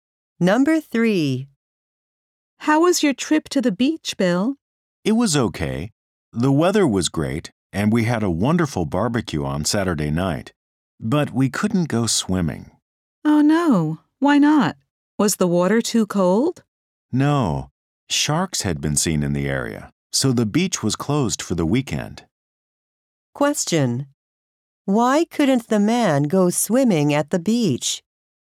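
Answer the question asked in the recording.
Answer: The beach was closed because sharks had been seen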